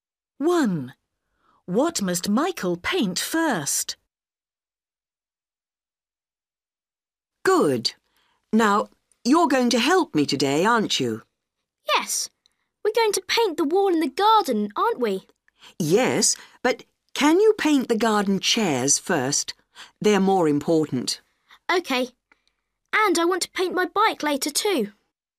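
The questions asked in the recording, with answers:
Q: What must Michael paint first?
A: the garden chairs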